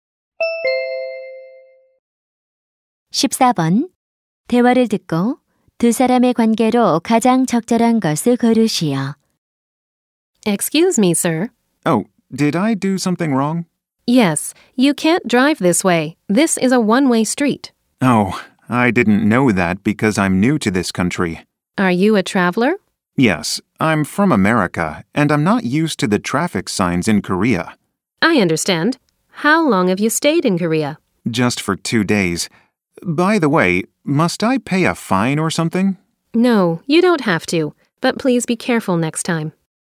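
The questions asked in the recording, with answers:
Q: 대화를 듣고 두 사람의 관계로 가장 적절한 것을 고르시오.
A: 경찰관과 운전자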